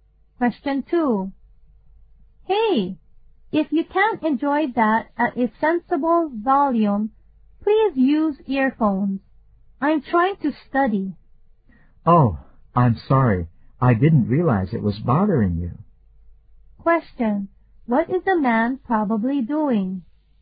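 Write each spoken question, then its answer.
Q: What is the man probably doing?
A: Playing music too loudly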